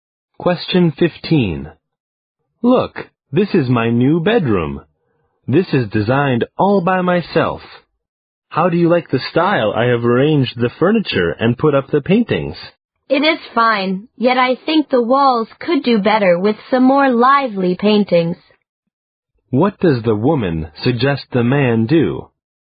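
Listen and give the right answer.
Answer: Put up some more lively paintings on the walls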